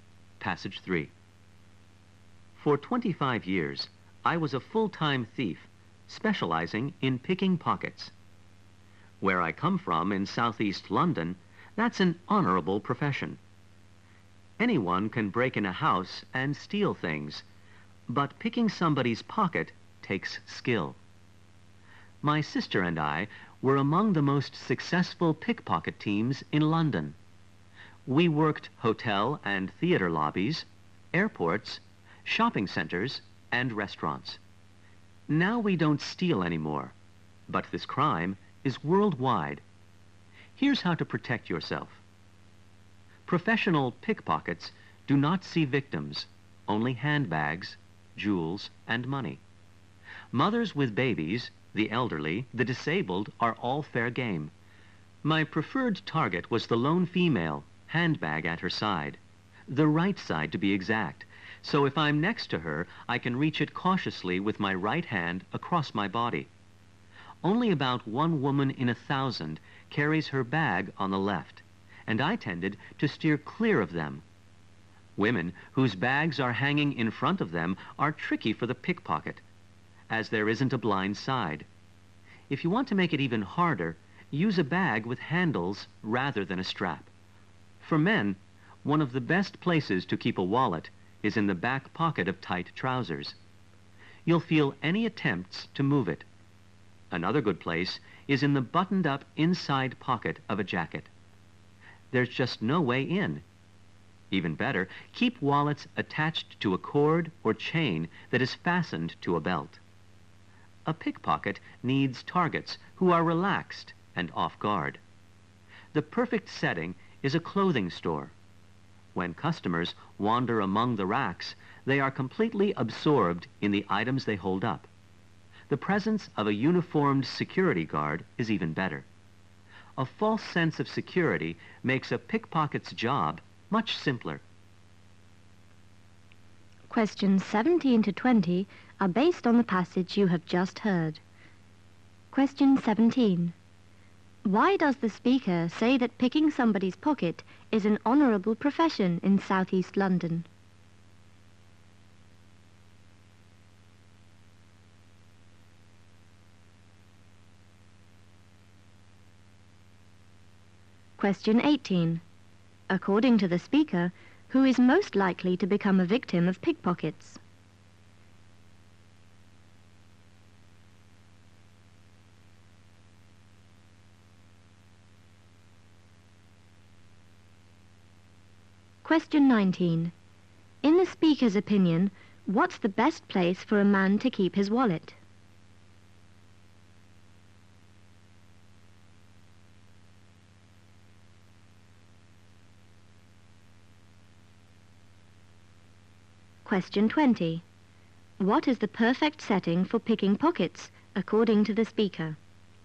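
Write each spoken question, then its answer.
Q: Why does the speaker say that picking somebody's pocket is an honorable profession in Southeast London?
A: Because it takes skill

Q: According to the speaker, who is most likely to become a victim of pickpockets?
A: A woman alone with her handbag on her right side

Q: What is the perfect setting for picking pockets, according to the speaker?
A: A clothing store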